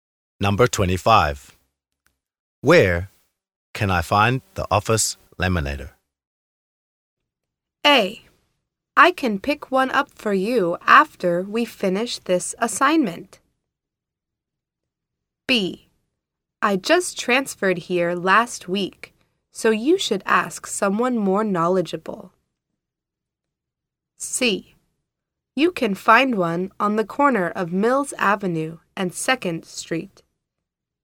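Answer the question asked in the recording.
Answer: B: I just transferred here last week, so you should ask someone more knowledgeable.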